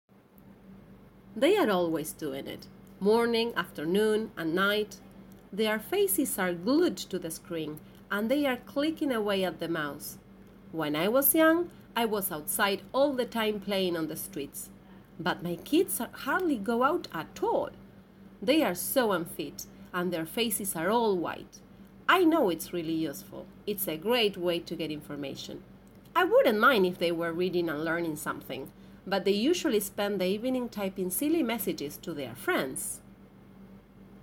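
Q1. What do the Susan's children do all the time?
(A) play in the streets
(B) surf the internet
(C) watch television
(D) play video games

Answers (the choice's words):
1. surf the internet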